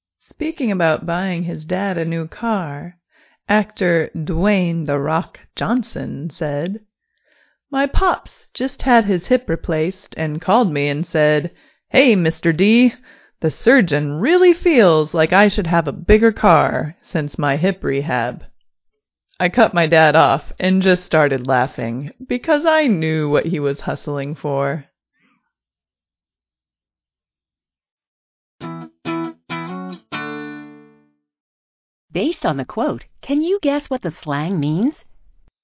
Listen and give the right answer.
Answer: Hustle is a verb meaning try to talk a person into something.